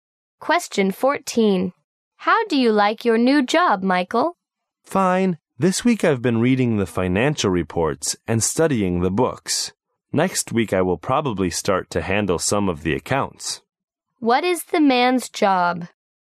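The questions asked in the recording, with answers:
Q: What is the man's job?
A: An accountant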